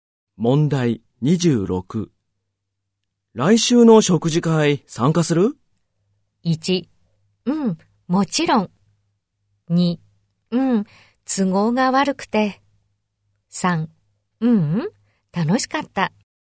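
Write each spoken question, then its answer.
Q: 来週の食事会参加する?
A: 1: うん、もちろん。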